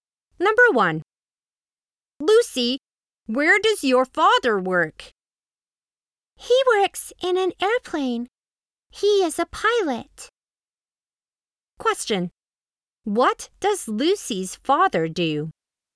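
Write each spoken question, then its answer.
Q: What does Lucy's father do?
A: He is a pilot.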